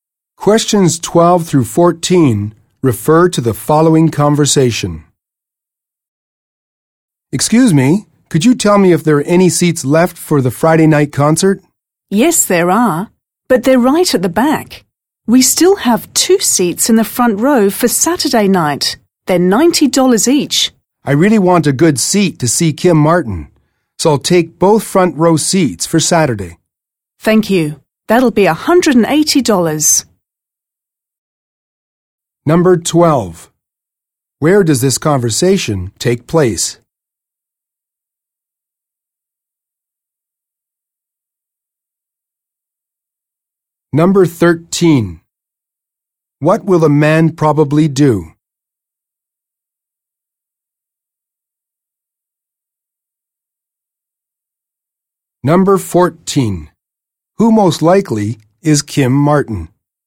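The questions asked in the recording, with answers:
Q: Where does this conversation take place?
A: At a ticket office

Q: What will a man probably do?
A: Buy two front row seats for Saturday

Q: Who most likely is Kim Martin?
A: A performer in the concert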